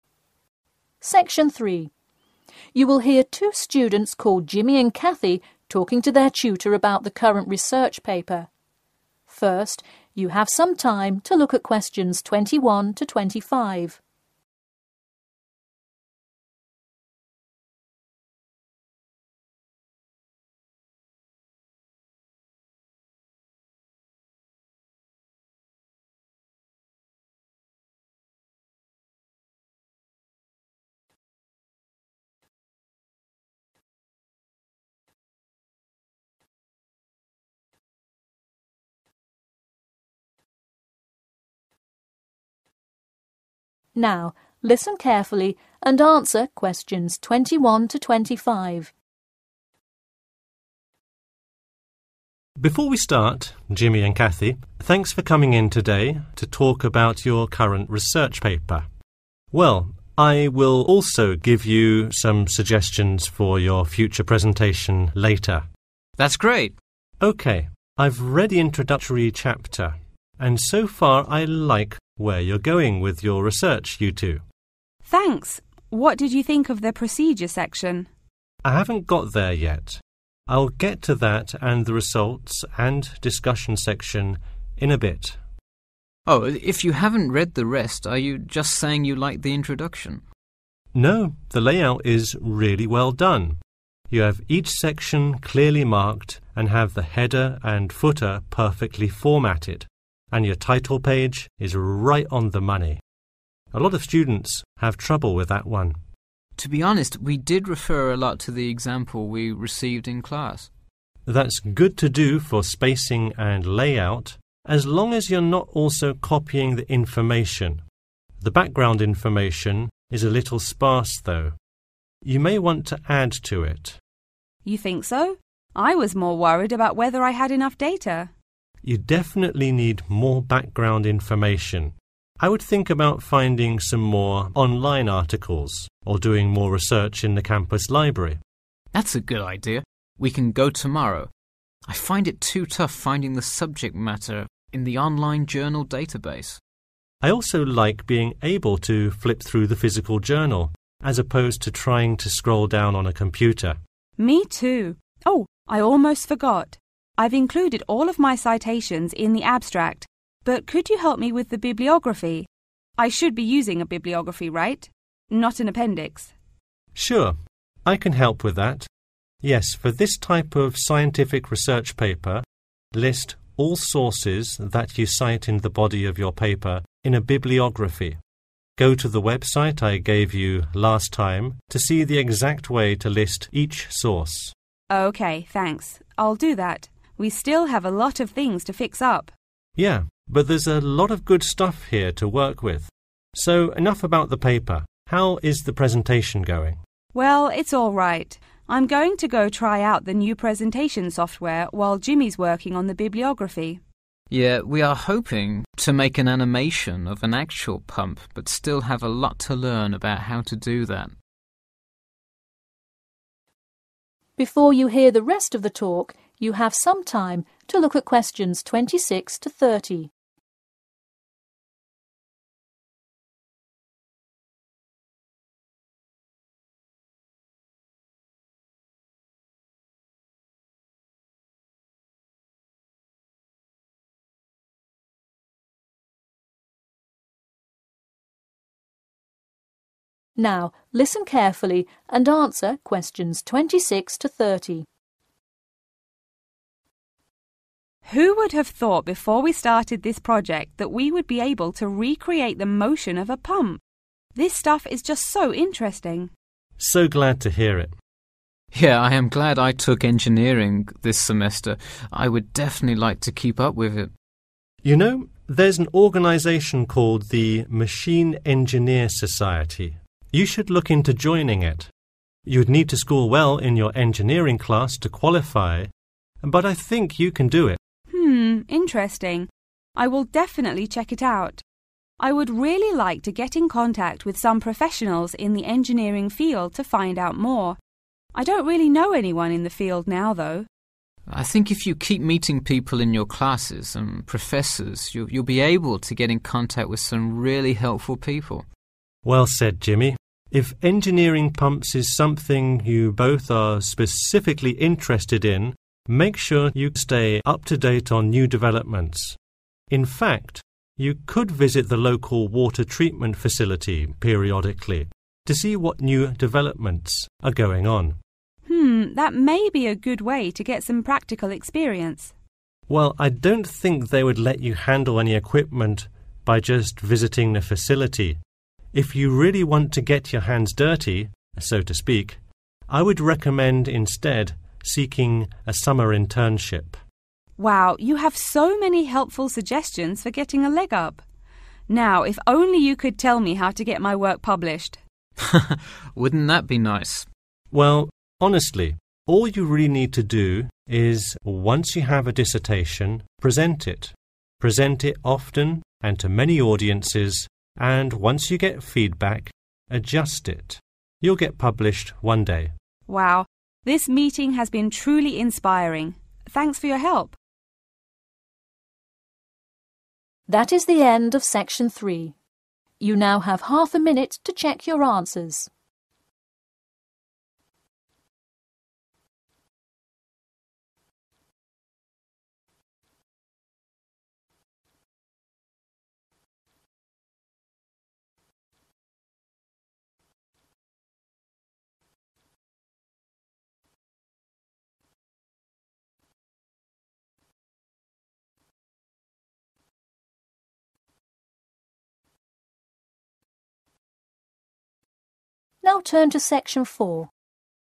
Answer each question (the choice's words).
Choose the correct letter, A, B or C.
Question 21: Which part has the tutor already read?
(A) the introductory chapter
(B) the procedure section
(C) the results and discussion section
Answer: the introductory chapter

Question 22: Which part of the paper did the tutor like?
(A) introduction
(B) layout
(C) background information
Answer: layout

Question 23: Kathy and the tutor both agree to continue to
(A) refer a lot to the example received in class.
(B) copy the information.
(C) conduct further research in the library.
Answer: conduct further research in the library.

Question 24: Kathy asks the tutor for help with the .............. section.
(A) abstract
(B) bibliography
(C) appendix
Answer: bibliography

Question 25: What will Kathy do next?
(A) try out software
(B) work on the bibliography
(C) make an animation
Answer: try out software

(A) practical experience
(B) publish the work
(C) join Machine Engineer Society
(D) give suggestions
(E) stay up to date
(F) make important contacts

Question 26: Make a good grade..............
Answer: join Machine Engineer Society

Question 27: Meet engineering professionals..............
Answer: make important contacts

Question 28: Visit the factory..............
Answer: stay up to date

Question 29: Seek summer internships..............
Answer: practical experience

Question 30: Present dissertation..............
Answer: publish the work